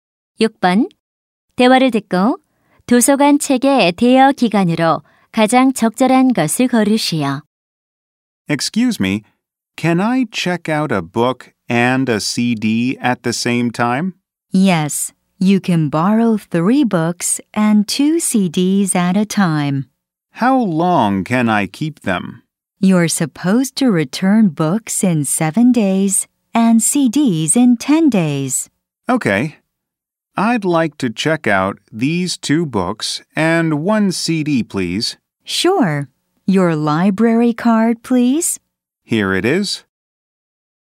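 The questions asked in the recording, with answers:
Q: 대화를 듣고 도서관 책의 대여 기간으로 가장 적절한 것을 고르시오.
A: 7일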